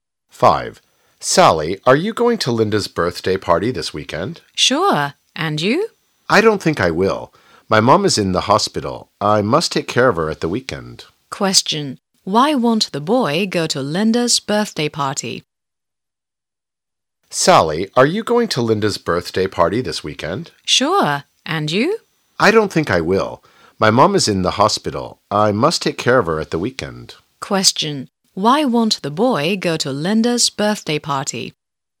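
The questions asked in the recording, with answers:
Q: Why won't the boy go to Linda's birthday party?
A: His mom is in the hospital and he must take care of her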